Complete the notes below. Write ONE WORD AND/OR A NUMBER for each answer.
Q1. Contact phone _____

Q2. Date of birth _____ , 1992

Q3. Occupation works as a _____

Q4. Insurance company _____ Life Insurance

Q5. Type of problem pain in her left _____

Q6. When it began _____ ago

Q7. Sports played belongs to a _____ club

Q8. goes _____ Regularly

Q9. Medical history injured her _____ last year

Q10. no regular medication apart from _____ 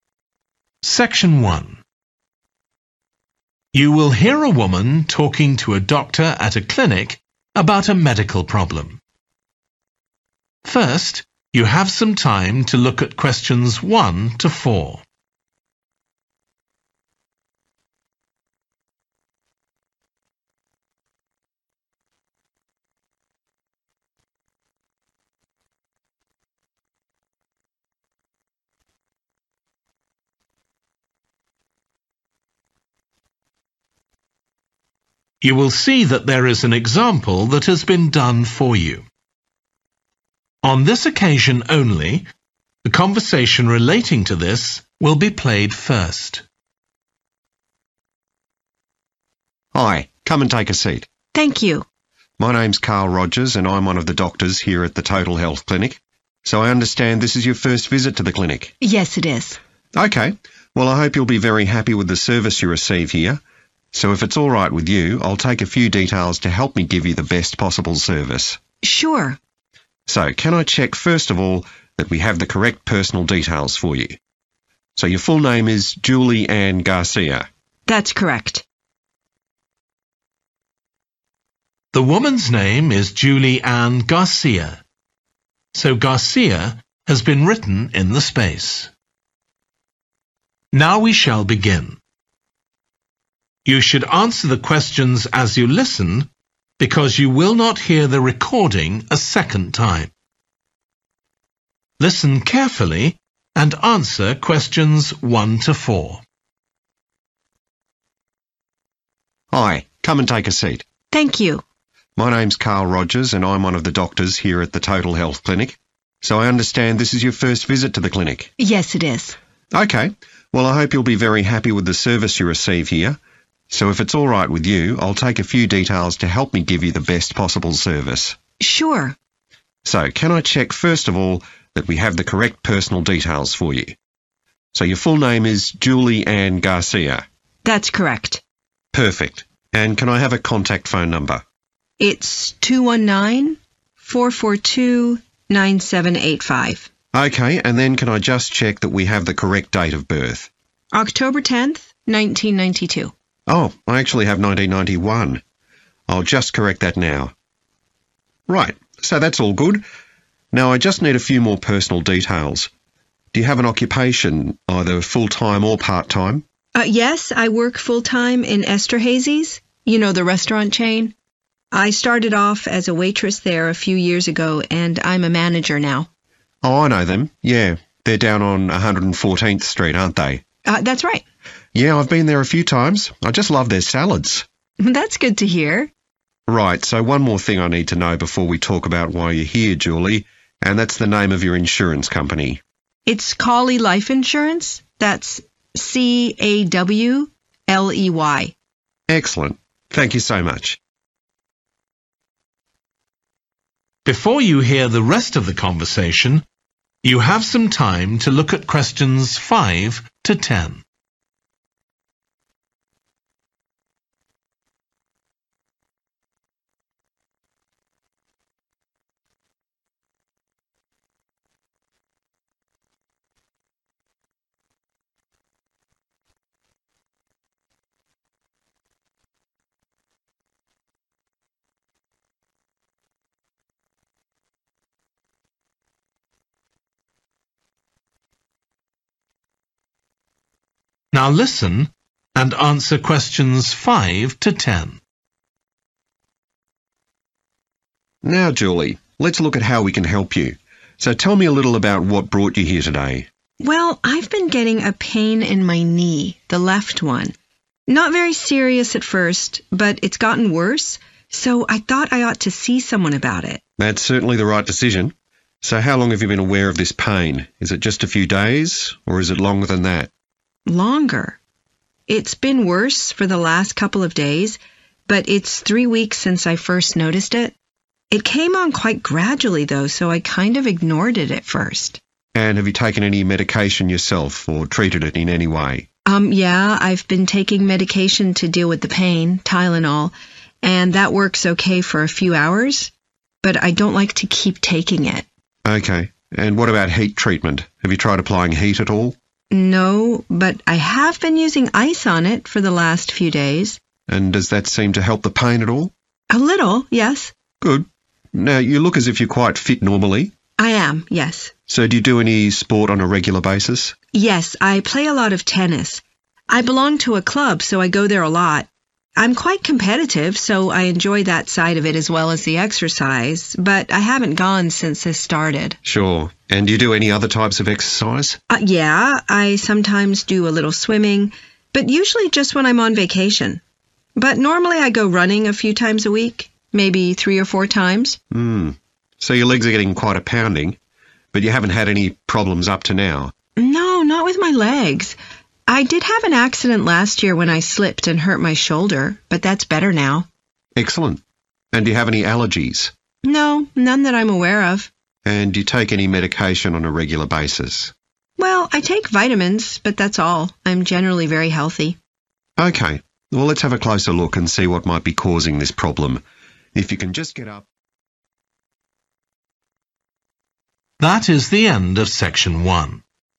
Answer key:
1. 219 442 9785 / 2194429785
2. 10 October / 10th October
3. manager
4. Cawley
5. knee
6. 3 weeks
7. tennis
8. running
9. shoulder
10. vitamins

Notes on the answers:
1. It's 219 442 9785. Excerpt/Transcript Explanation: The transcript states a phone number: 219 442 9785. Answer Explanation: The answer provided is a phone number: 219 442 9785. Reason For Correctness: The correct answer matches the format and content of a phone number, which is consistent with the information given in the excerpt, confirming its correctness.
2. October tenth, 1992. Excerpt/Transcript Explanation: The transcript mentions a specific date, which is October tenth, 1992. Answer Explanation: The answer is '10 October' or '10th October', which refers to the same date mentioned in the excerpt. Reason For Correctness: The correct answer matches the date provided in the excerpt, confirming the accuracy of the response.
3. I started off as a waitress there a few years ago and I'm a manager now. Excerpt/Transcript Explanation: The transcript mentions that the person started working at a place as a waitress a few years ago and has now been promoted to a manager. Answer Explanation: The answer 'manager' refers to a person who is in charge of a team or department, responsible for making decisions and overseeing operations. Reason For Correctness: The correct answer fits the context of the excerpt where the person talks about their career progression from being a waitress to currently holding a managerial position.
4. It's Cawley Life Insurance, that's C-A-W-L-E-Y. Excerpt/Transcript Explanation: The transcript mentions a specific insurance company, which is named Cawley Life Insurance and spelled out as C-A-W-L-E-Y. Answer Explanation: The answer 'Cawley' is a name, specifically the name of the insurance company referenced in the excerpt. Reason For Correctness: The correct answer is 'Cawley' because it matches the name of the insurance company provided in the excerpt, confirming the accuracy of the response.
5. Well, I've been getting a pain in my knee, the left one. Excerpt/Transcript Explanation: The transcript says that the person has been feeling pain in their knee. Answer Explanation: The answer 'knee' is the body part where the person is experiencing pain. Reason For Correctness: The correct answer 'knee' is right because the transcript states the person has pain in their left knee. This matches the question asking about the type of problem, which is pain in the left knee.
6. it's three weeks since I first noticed it. Excerpt/Transcript Explanation: The transcript mentions that it has been three weeks since the patient first noticed the problem. Answer Explanation: The answer '3 weeks' indicates the amount of time that has passed since the issue initially started. Reason For Correctness: The correct answer matches the timeframe mentioned in the excerpt, which is 'three weeks.' It directly corresponds to the information provided about when the problem began.
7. Yes, I play a lot of tennis. Excerpt/Transcript Explanation: The transcript shows that the person plays tennis frequently. Answer Explanation: The answer is 'tennis' because it is the sport that the person said they play a lot. Reason For Correctness: The correct answer is 'tennis' because the person mentioned in the transcript that they play a lot of it.
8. But normally I go running a few times a week, maybe three or four times. Excerpt/Transcript Explanation: The transcript mentions that the person goes running a few times a week, indicating that the individual engages in the physical activity of running regularly. Answer Explanation: The answer 'running' refers to the physical activity of moving quickly on foot. In this context, it means the patient engages in the activity of running as part of their exercise routine. Reason For Correctness: The correct answer is 'running' because it matches the physical activity described in the excerpt where the patient mentions going running a few times a week. This activity is crucial information for understanding the patient's lifestyle and potential impact on their health.
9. I did have an accident last year when I slipped and hurt my shoulder, but that's better now. Excerpt/Transcript Explanation: The transcript mentions that the person had an accident last year and injured their shoulder, but it is now in a better condition. Answer Explanation: The answer 'shoulder' refers to the body part where the person had previous injury. Reason For Correctness: The correct answer is 'shoulder' because the person mentioned injuring it last year, which matches with the information provided in the excerpt about hurting the shoulder in an accident.
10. Well, I take vitamins but that's all. Excerpt/Transcript Explanation: The transcript indicates that the person mentioned they only take vitamins. Answer Explanation: The answer refers to the vitamins the person takes regularly. Reason For Correctness: The correct answer is 'vitamins' because the person stated that the only regular medication they take is vitamins, aligning with the provided information in the excerpt.

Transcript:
CARL: Hi, come and take a seat.
JULIE: Thank you.
CARL: My name's Carl Rogers and I'm one of the doctors here at the Total Health Clinic. So I understand this is your first visit to the clinic?
JULIE: Yes, it is.
CARL: OK, well I hope you'll be very happy with the service you receive here. So if it's alright with you I'll take a few details to help me give you the best possible service.
JULIE: Sure.
CARL: So can I check first of all that we have the correct personal details for you? So your full name is Julie Anne Garcia?
JULIE: That's correct.
CARL: Perfect. And can I have a contact phone number?
JULIE: It's 219 442 9785.
CARL: OK, and then can I just check that we have the correct date of birth?
JULIE: October tenth, 1992.
CARL: Oh, I actually have 1991, I'll just correct that now. Right, so that's all good. Now I just need just a few more personal details ... do you have an occupation, either full-time or part-time?
JULIE: Yes, I work full-time in Esterhazy's – you know, the restaurant chain. I started off as a waitress there a few years ago and I'm a manager now.
CARL: Oh I know them, yeah, they're down on 114th Street, aren't they?
JULIE: That's right.
CARL: Yeah, I've been there a few times. I just love their salads.
JULIE: That's good to hear.
CARL: Right, so one more thing I need to know before we talk about why you're here, Julie, and that's the name of your insurance company.
JULIE: It's Cawley Life Insurance, that's C-A-W-L-E-Y.
CARL: Excellent, thank you so much.
JULIE: Now Julie, let's look at how we can help you. So tell me a little about what brought you here today.
CARL: Well, I've been getting a pain in my knee, the left one. Not very serious at first, but it's gotten worse, so I thought I ought to see someone about it.
JULIE: That's certainly the right decision. So how long have you been aware of this pain? Is it just a few days, or is it longer than that?
CARL: Longer. It's been worse for the last couple of days, but it's three weeks since I first noticed it. It came on quite gradually though, so I kind of ignored it at first.
JULIE: And have you taken any medication yourself, or treated it in anyway?
CARL: Yeah, I've been taking medication to deal with the pain. Tylenol, and that works OK for a few hours. But I don't like to keep taking it.
JULIE: OK. And what about heat treatment? Have you tried applying heat at all?
CARL: No, but I have been using ice on it for the last few days.
JULIE: And does that seem to help the pain at all?
CARL: A little, yes.
JULIE: Good. Now you look as if you're quite fit normally?
CARL: I am, yes.
JULIE: So do you do any sport on a regular basis?
CARL: Yes, I play a lot of tennis. I belong to a club so I go there a lot. I'm quite competitive so I enjoy that side of it as well as the exercise. But I haven't gone since this started.
JULIE: Sure. And do you do any other types of exercise?
CARL: Yeah, I sometimes do a little swimming, but usually just when I'm on vacation. But normally I go running a few times a week, maybe three or four times.
JULIE: Hmm. So your legs are getting quite a pounding. But you haven't had any problems up to now?
CARL: No, not with my legs. I did have an accident last year when I slipped and hurt my shoulder, but that's better now.
JULIE: Excellent. And do you have any allergies?
CARL: No, none that I'm aware of.
JULIE: And do you take any medication on a regular basis?
CARL: Well, I take vitamins but that's all. I'm generally very healthy.
JULIE: OK, well let's have a closer look and see what might be causing this problem. If you can just get up ...